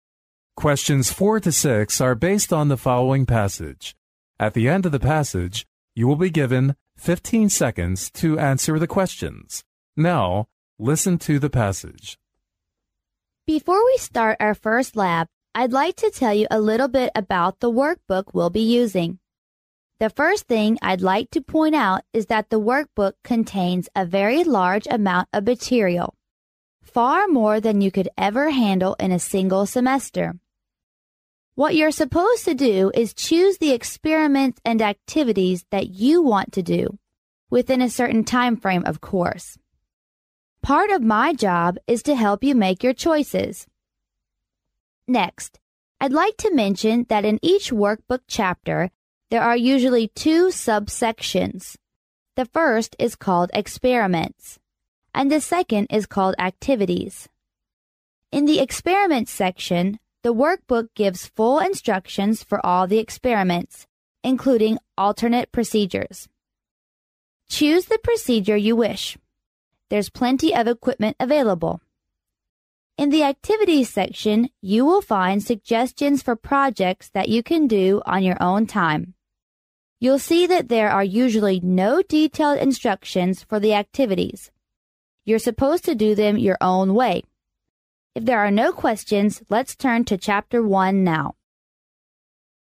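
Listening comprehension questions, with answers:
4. How long does it take to cover the workbook material?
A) For more than a term.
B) For less than a semester.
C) For no more than a terra.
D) For no less than a year.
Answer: A) For more than a term.

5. According to the passage, students would choose the experiments and activities_____.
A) under a set structure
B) in accordance with instructions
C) based on discussions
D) within some frameworks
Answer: D) within some frameworks

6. Where can you find detailed procedures in the workbook?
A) In "Preface" section.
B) In "Directions" section.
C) In "Experiments" section.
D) In "Activities" section.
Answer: C) In "Experiments" section.

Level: 专业四级

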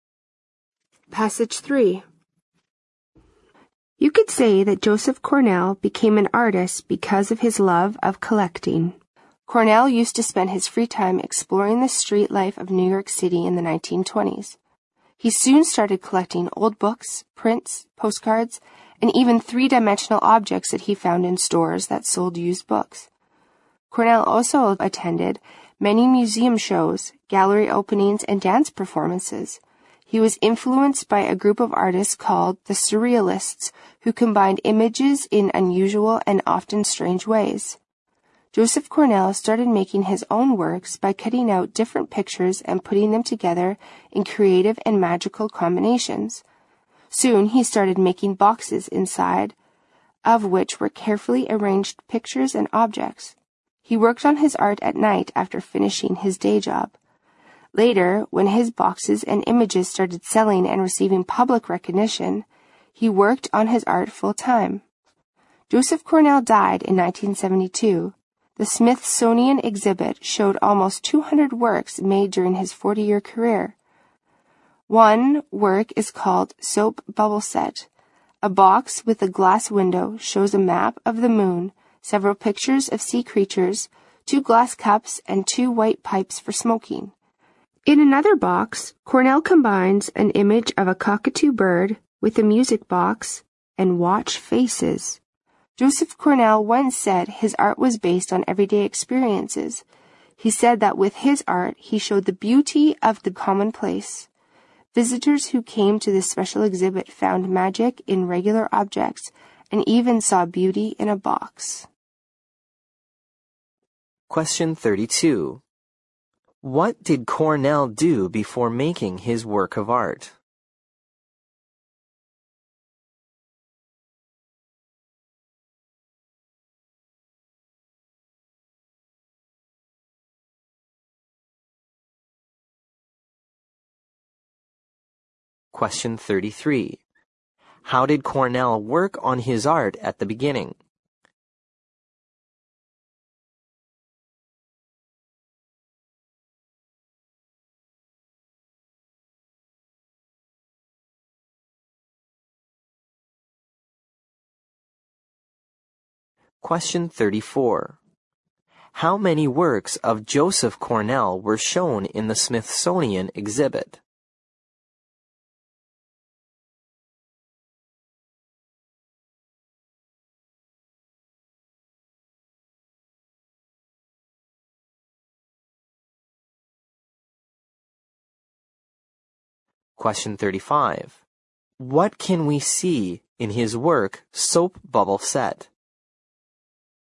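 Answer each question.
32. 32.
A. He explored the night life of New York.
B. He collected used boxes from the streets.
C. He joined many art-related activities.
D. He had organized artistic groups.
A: C. He joined many art-related activities.

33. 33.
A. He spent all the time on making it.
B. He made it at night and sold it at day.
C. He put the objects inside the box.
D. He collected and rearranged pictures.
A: B. He made it at night and sold it at day.

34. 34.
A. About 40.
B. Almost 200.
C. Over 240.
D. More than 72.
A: B. Almost 200.

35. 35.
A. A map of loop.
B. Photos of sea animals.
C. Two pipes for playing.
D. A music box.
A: B. Photos of sea animals.

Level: 六级

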